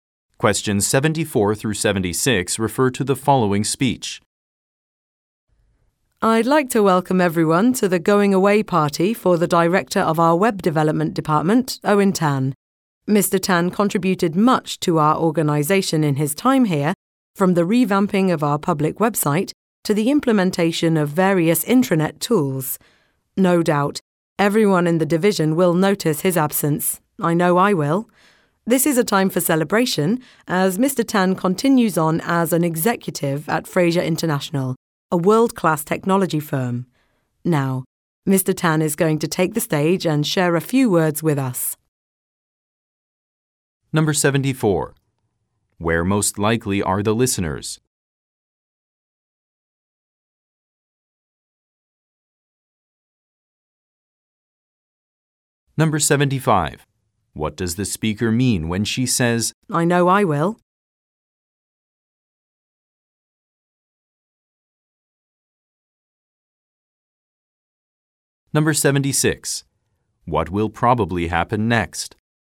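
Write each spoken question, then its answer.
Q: Where most likely are the listeners?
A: At a going-away party

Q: What will probably happen next?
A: Mr. Tan will give a speech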